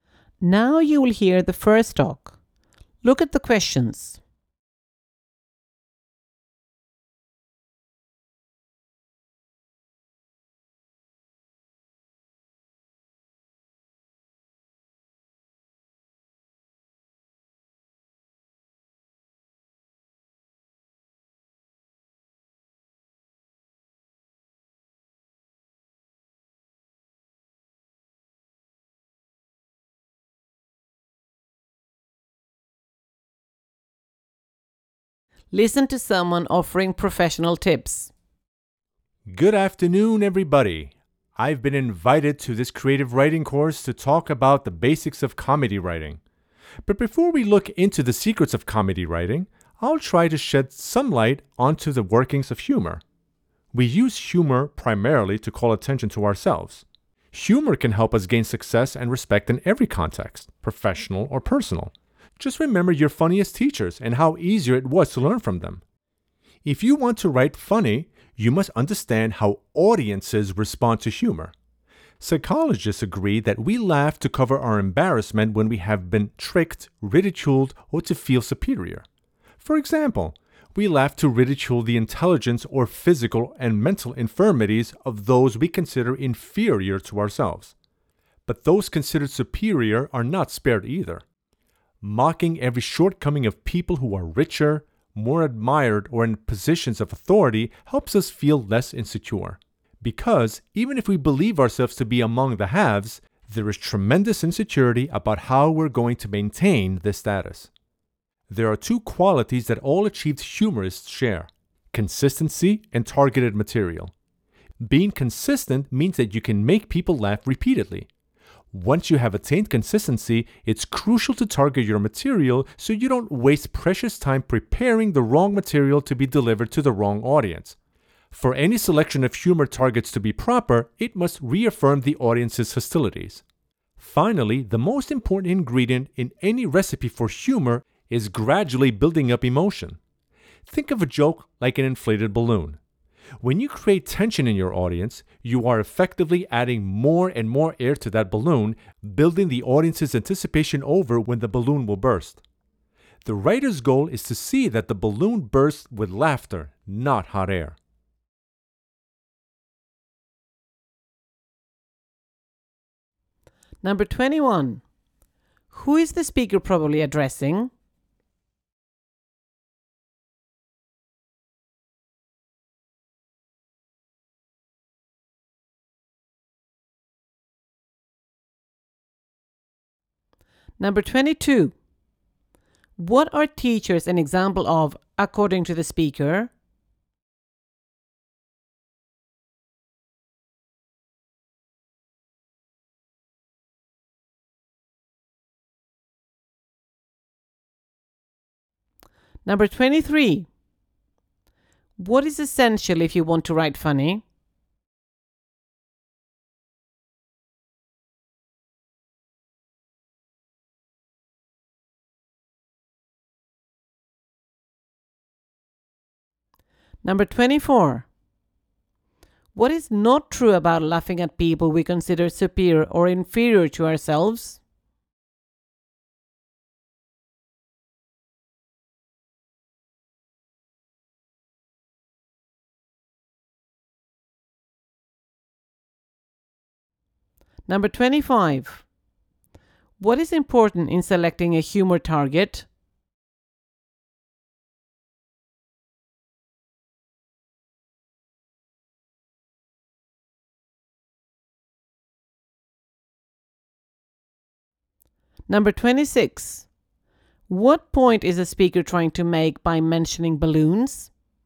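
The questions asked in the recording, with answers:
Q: Who is the speaker probably addressing?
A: Students on a creative writing course

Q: What is essential if you want to write funny?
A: Understanding how audiences respond to humor

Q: What is important in selecting a humor target?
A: It must reaffirm the audience's hostilities

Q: What point is a speaker trying to make by mentioning balloons?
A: Humor needs tension to be built up gradually until it bursts into laughter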